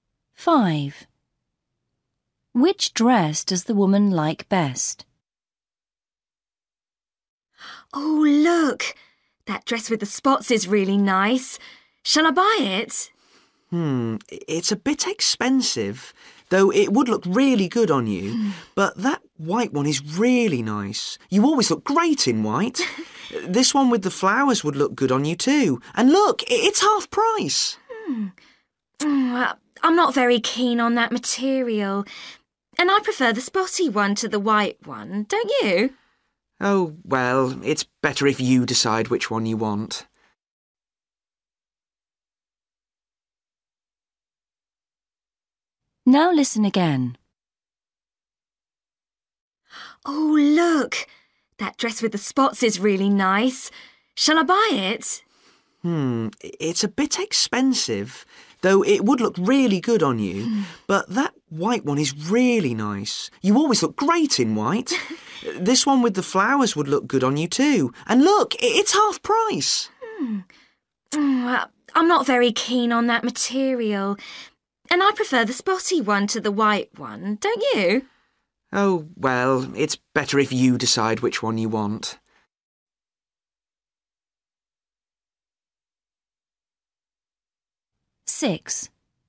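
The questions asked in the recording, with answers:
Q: Which dress does the woman like best?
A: the dress with spots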